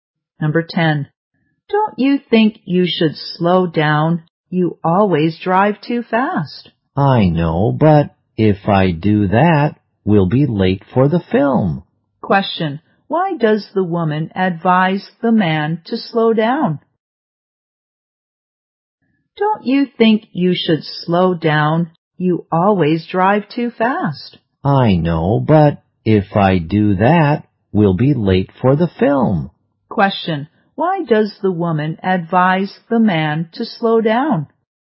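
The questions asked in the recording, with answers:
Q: Why does the woman advise the man to slow down?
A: He always drives too fast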